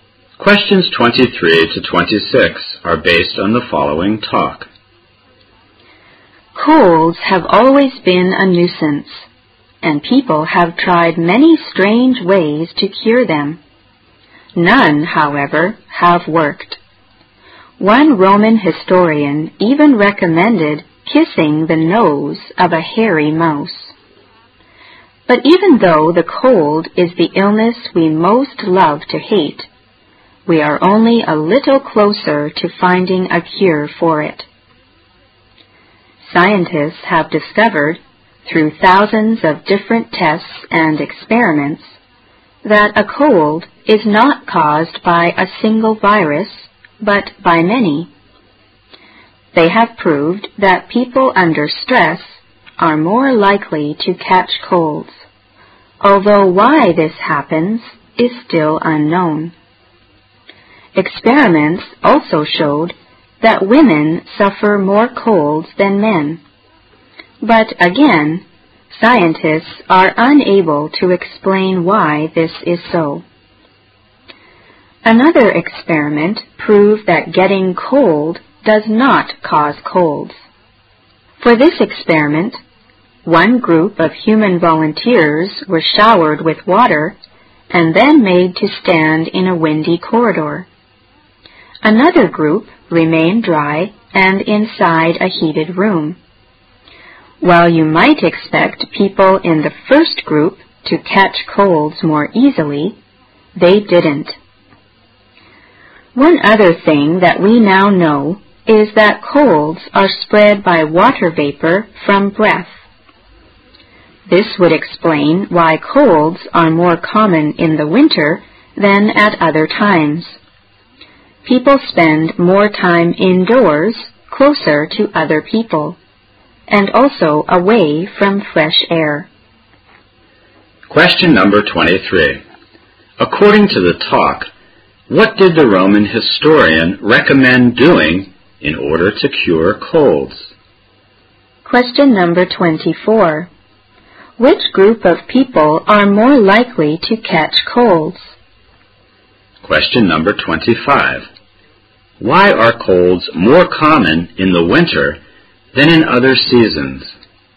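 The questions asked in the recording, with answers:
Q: According to the talk, what did the Roman historian recommend doing in order to cure colds?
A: Kissing the nose of a hairy mouse

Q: Why are colds more common in the winter than in other seasons?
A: People spend more time indoors, close to others and away from fresh air.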